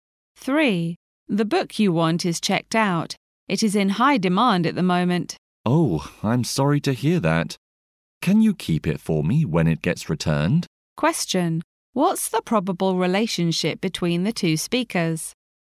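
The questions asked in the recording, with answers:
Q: What's the probable relationship between the two speakers?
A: Librarian and library user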